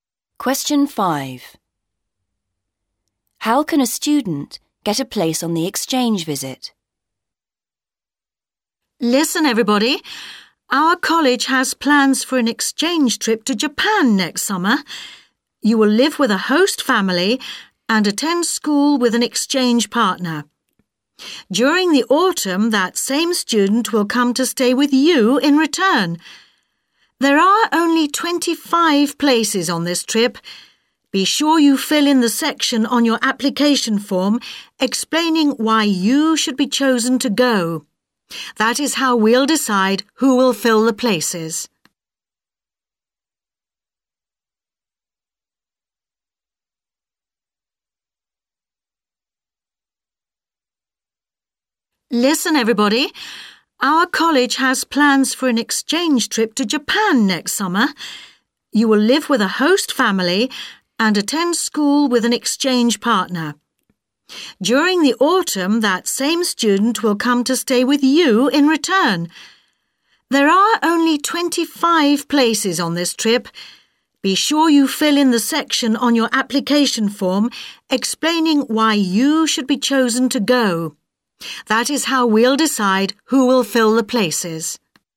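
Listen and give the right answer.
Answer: By filling in the section of the application form explaining why they should be chosen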